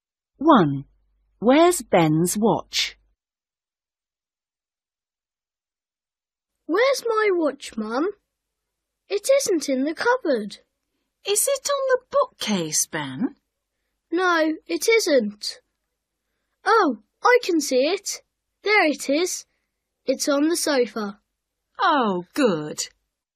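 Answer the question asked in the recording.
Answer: On the sofa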